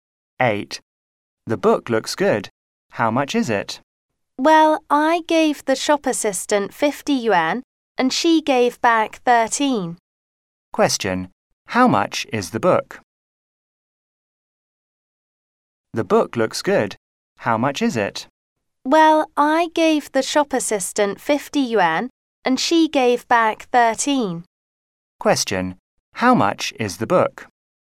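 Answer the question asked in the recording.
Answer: 37 yuan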